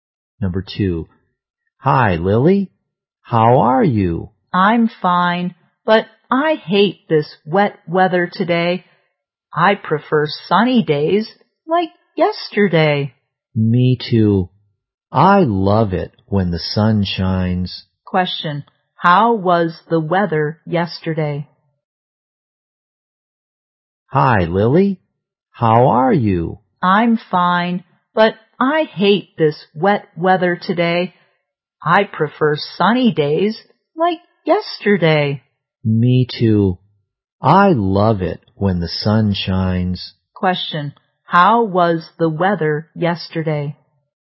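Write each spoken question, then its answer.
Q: how was the weather yesterday?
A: Sunny.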